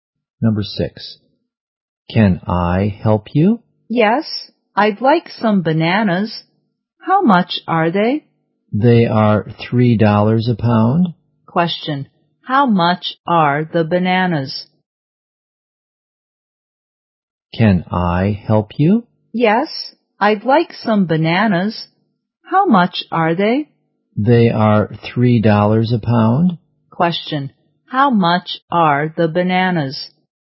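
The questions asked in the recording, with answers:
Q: Question, how much are the bananas?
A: $3 a pound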